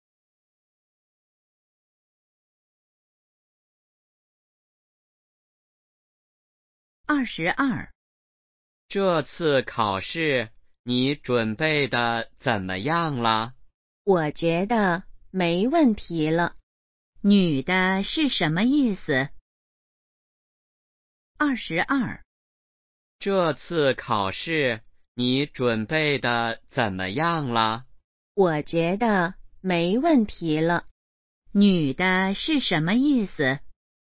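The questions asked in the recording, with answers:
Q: 女的是什么意思?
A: 准备好了,没问题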